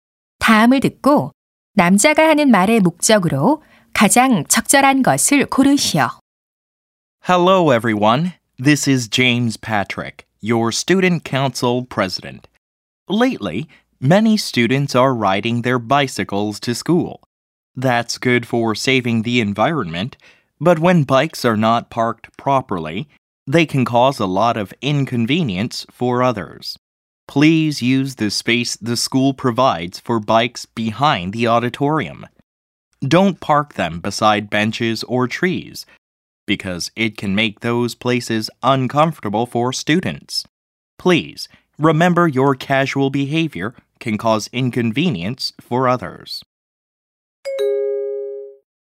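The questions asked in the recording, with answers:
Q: 다음을 듣고 남자가 하는 말의 목적으로 가장 적절한 것을 고르시오.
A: 자전거를 지정된 장소(강당 뒤)에 주차하도록 당부하려고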